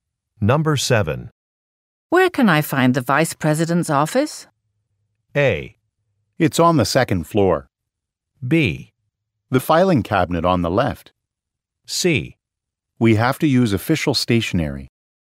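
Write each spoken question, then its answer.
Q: Where can I find the Vice President's office?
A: A: It's on the second floor.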